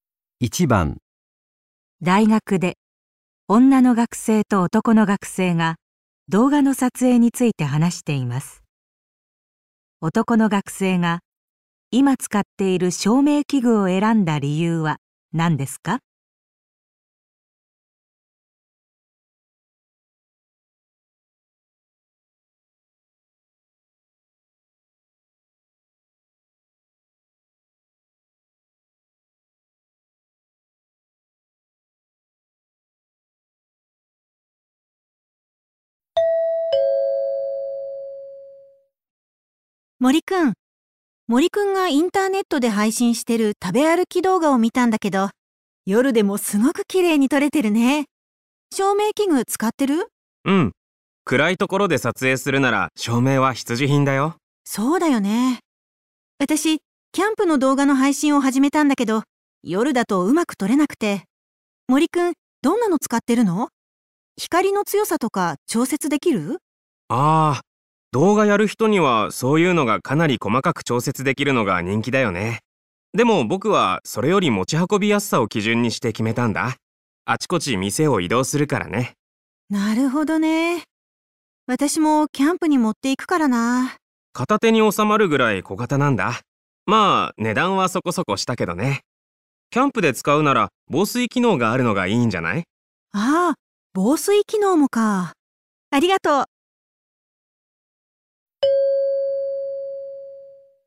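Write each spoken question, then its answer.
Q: 男の学生が今使っている照明器具を選んだ理由は何ですか?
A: 持ち運びやすいから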